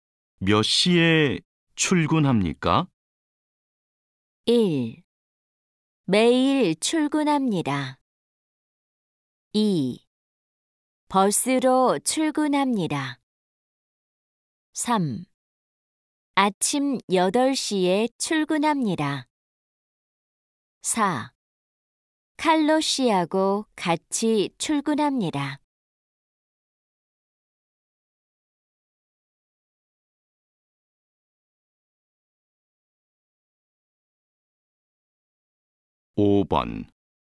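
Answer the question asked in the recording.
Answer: 3: 아침 8시에 출근합니다.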